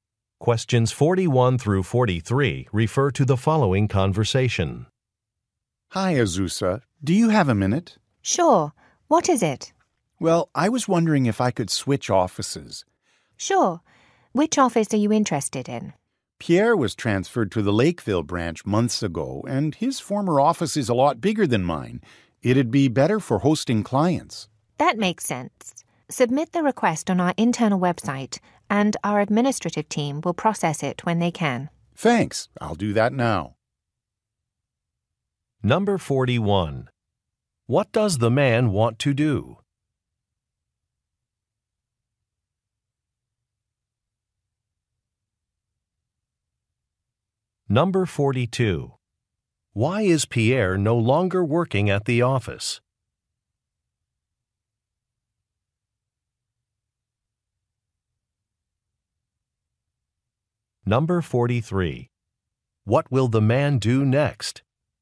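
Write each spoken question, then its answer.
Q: What does the man want to do?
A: Switch offices.

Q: Why is Pierre no longer working at the office?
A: He was transferred to the Lakeville branch.

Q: What will the man do next?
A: Submit a request on the internal website.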